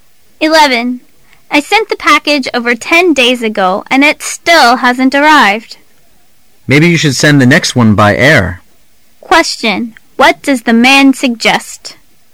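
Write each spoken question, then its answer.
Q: What does the man suggest?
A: Send the next package by air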